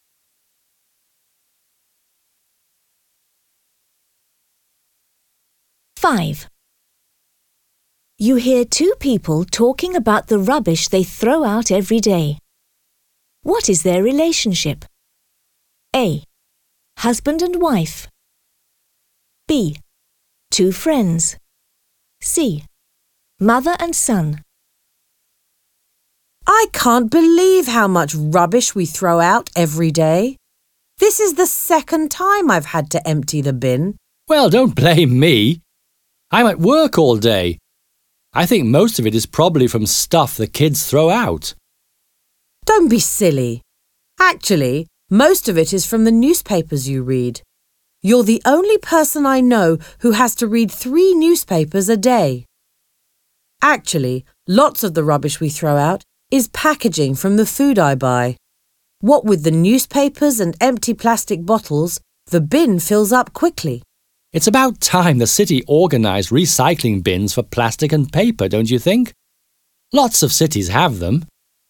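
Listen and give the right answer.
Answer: A: Husband and wife.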